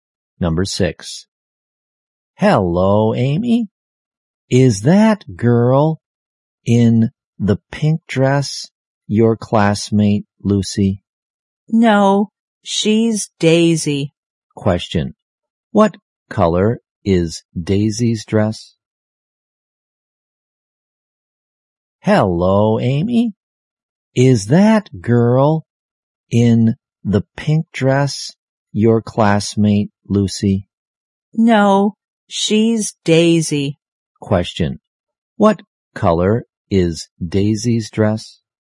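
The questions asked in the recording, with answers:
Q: What color is Daisy's dress?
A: Pink.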